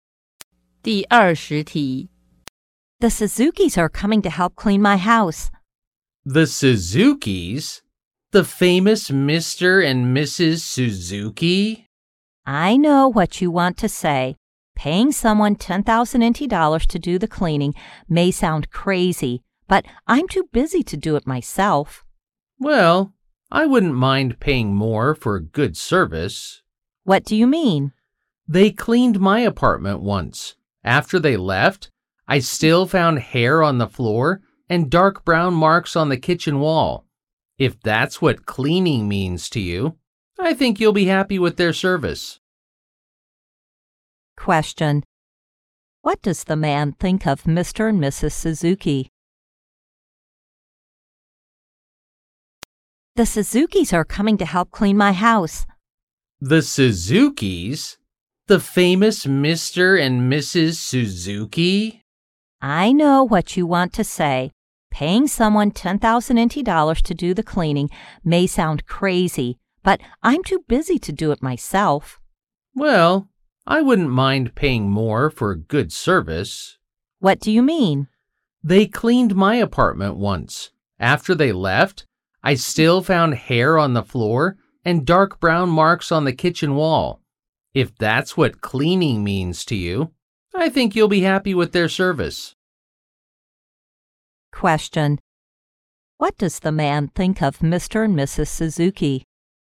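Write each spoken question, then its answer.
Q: What does the man think of Mr. and Mrs. Suzuki?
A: Their cleaning isn't good, even though it's expensive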